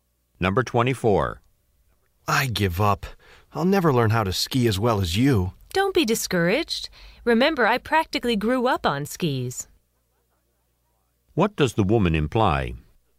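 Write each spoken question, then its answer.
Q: What does the woman imply?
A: She skis well because she has skied since childhood.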